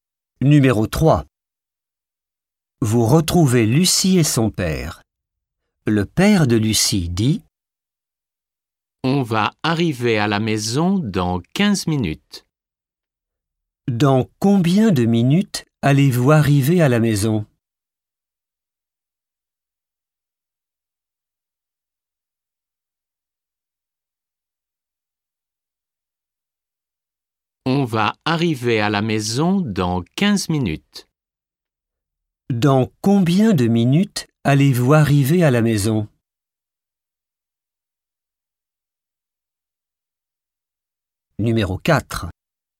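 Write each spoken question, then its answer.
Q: Dans combien de minutes allez-vous arriver à la maison?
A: Dans 15 minutes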